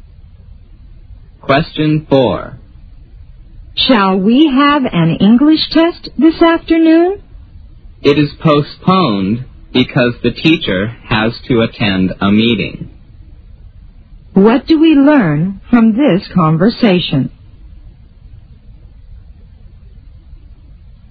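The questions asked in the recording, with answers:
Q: What do we learn from this conversation?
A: The English test this afternoon has been postponed because the teacher has a meeting.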